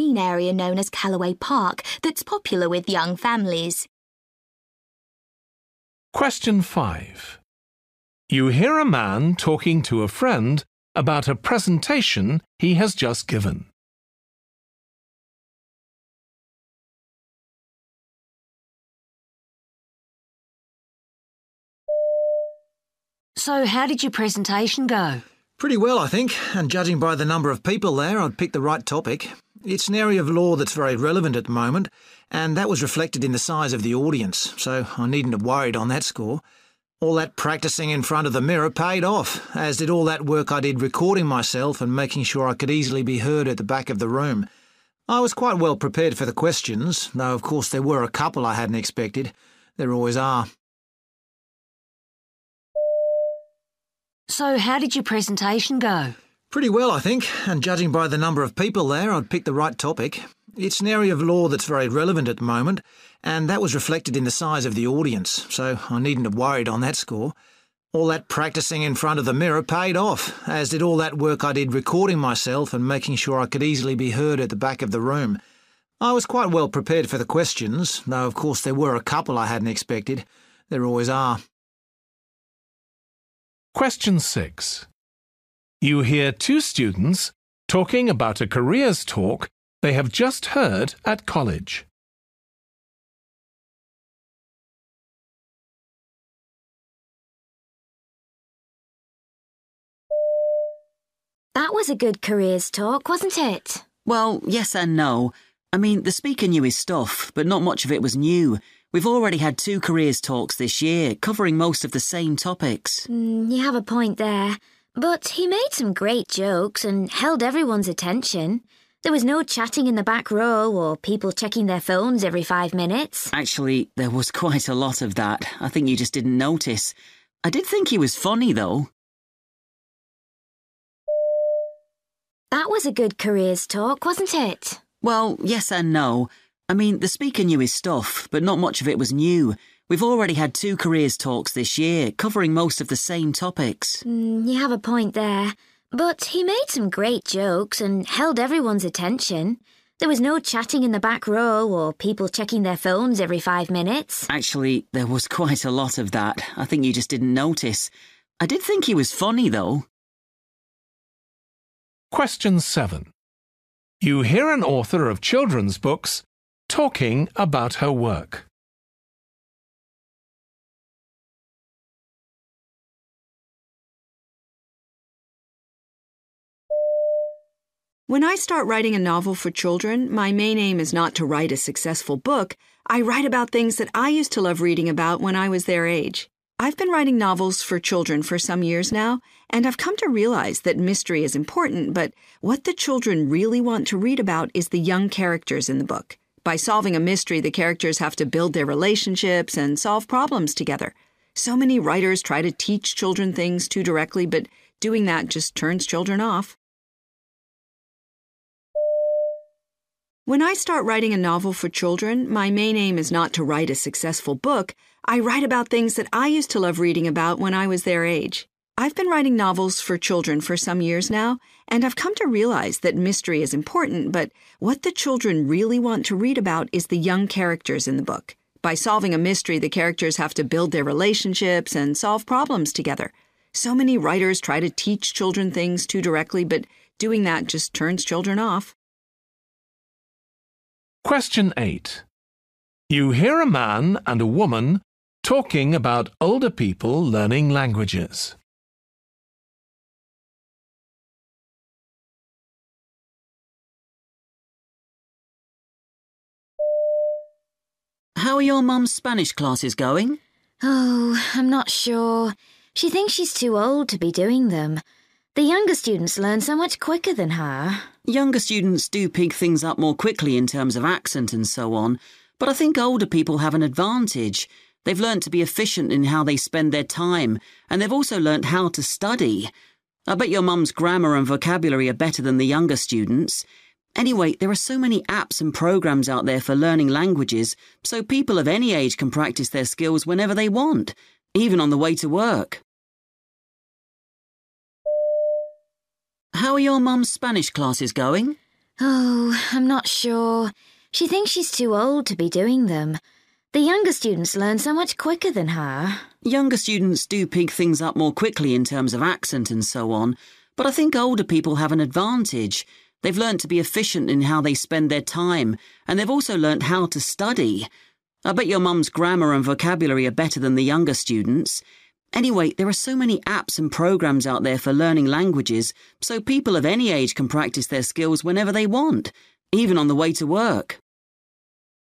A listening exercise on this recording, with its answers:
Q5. How does he feel now?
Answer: confident that he spoke clearly

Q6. What do they disagree about?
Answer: how well the audience behaved

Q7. What point is she making?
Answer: Friendship is the main focus of her stories.

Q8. What does the man say about them?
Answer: They use better learning techniques.

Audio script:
Now down in the valley below there you can make out the River Thorn at its widest point, which Alder actually wrote about in many of his poems we all read when we were at school. Then if you look to halfway up the hill I'm sure you can see a large green area known as Callaway Park that's popular with young families.
5
Woman: So, how did your presentation go?
Man: Pretty well, I think ... and judging by the number of people there, I'd picked the right topic. It's an area of law that's very relevant at the moment, and that was reflected in the size of the audience. So I needn't have worried on that score. All that practising in front of the mirror paid off, as did all that work I did recording myself and making sure I could easily by heard at the back of the room. I was quite well prepared for the questions, though of course there were a couple I hadn't expected – there always are.
6
Woman: That was a good careers talk, wasn't it?
Man: Well, yes and no. I mean, the speaker knew his stuff, but not much of it was new – we've already had two careers talks this year, covering most of the same topics.
you have a point there, but he made some great jokes, and held everyone's attention. There was no chatting in the back row, or people checking their phones every five minutes.
Man: Actually, there was quite a lot of that – I think you just didn't notice. I did think he was funny, though.
7
Woman: When I start writing a novel for children, my main aim is not to write a successful book – I write about things that I used to love reading about when I was their age. I've been writing novels for children for some years now and I've come to realise that mystery is important, but, what the children really want to read about is the young characters in the book. By solving a mystery, the characters have to build their relationships and solve problems together. So many writers try to teach children things too directly, but doing that just turns children off.
8
Man: How are your mum's Spanish classes going?
Woman: Oh, I'm not sure. She thinks she's too old to be doing them. The younger students learn so much quicker than her.
Man: Younger students do pick things up more quickly in terms of accent and so on. But I think older people have an advantage. They've learnt to be efficient in how they spend their time and they've also learnt how to study. I bet your mum's grammar and vocabulary are better than the younger students'. Anyway, there are so many apps and programmes out there for learning languages so people of any age can practise their skills whenever they want – even on the way to work!